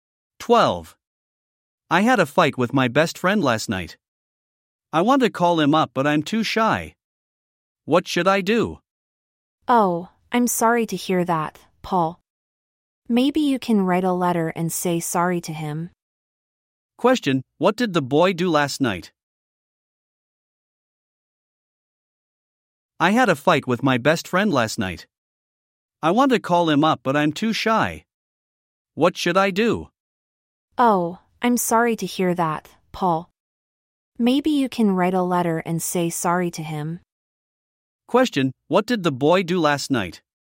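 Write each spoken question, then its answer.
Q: Question, what did the boy do last night?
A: He had a fight with his best friend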